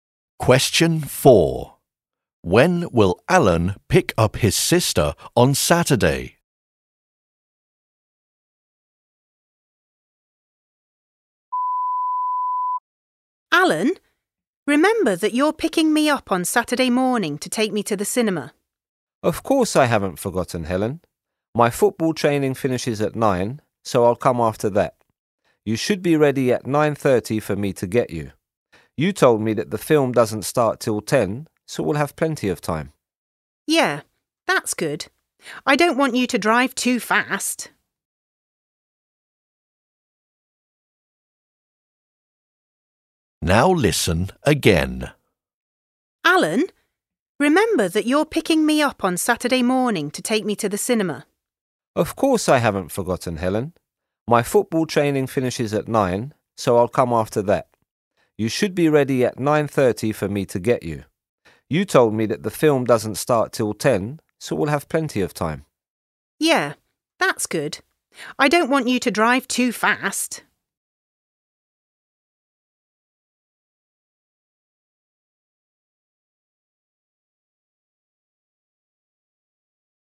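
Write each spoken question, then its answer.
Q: When will Alan pick up his sister on Saturday?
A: At 9:30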